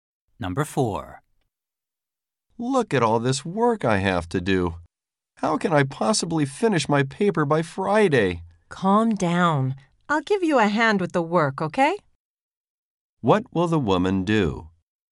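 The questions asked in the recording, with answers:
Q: What will the woman do?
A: Help the man with his work.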